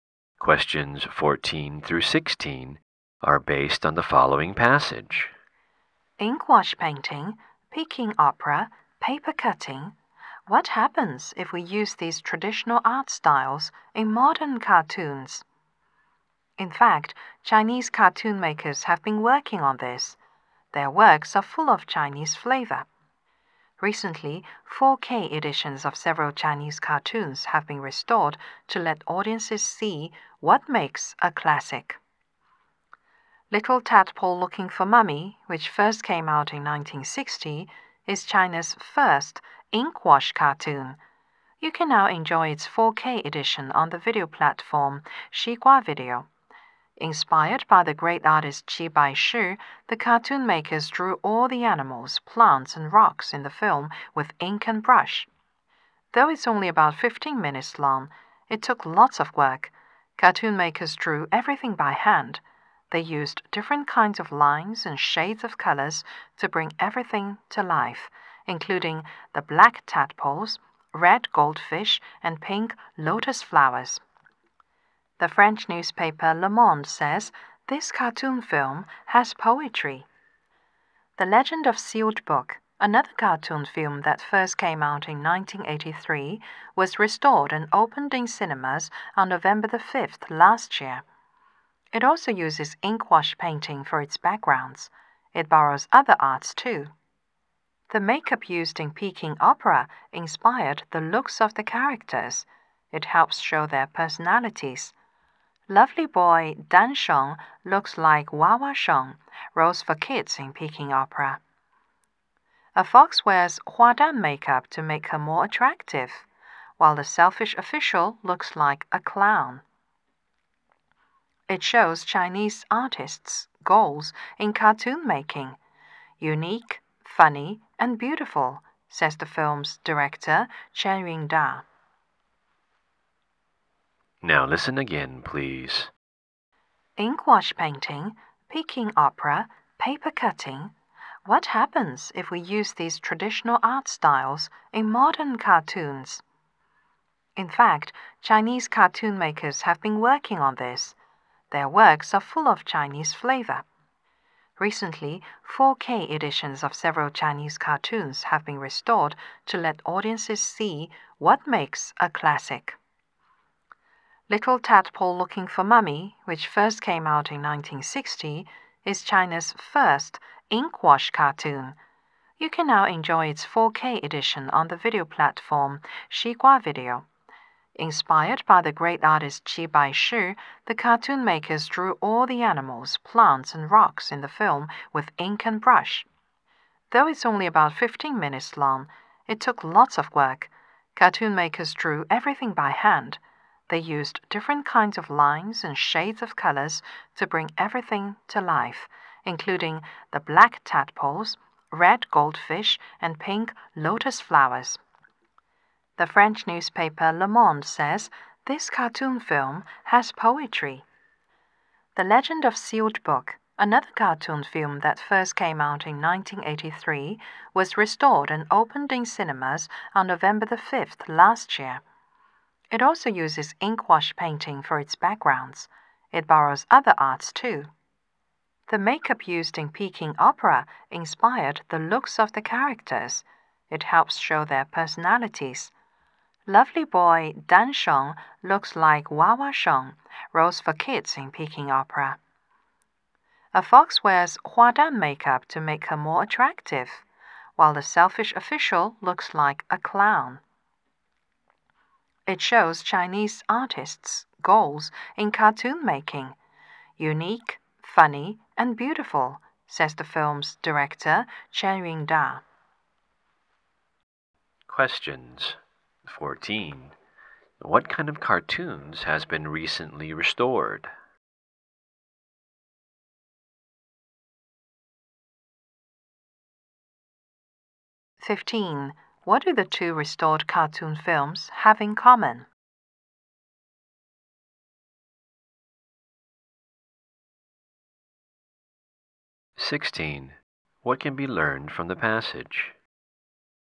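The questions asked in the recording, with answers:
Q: What kind of cartoons has been recently restored?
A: Classic Chinese cartoons, in 4K editions

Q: What do the two restored cartoon films have in common?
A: Both use ink wash painting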